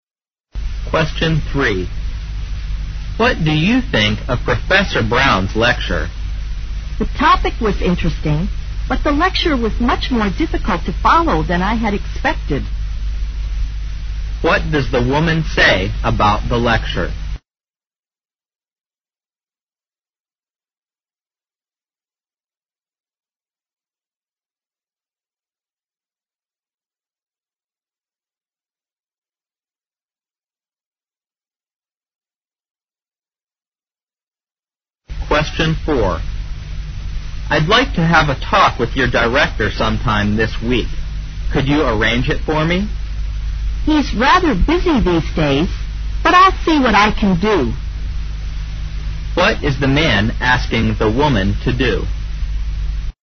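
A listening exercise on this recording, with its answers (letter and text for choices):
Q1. Q: What does the woman say about the lecture?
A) It was a long lecture, but easy to understand.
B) It was not as easy as she had thought.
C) It was as difficult as she had expected.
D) It was interesting and easy to follow.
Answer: B) It was not as easy as she had thought.

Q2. Q: What's the man asking the woman to do?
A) To put him through to the director.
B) To have a talk with the director about his work.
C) To arrange an appointment for him with the director.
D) To go and see if the director can meet him right now.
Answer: C) To arrange an appointment for him with the director.

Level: 四级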